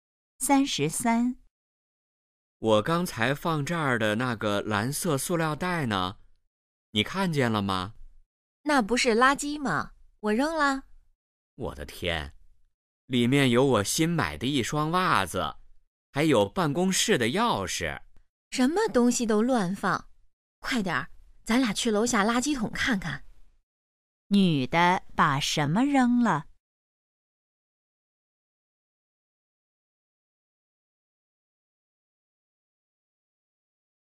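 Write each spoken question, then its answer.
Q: 女的把什么扔了?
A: 一个蓝色塑料袋(里面有袜子和钥匙)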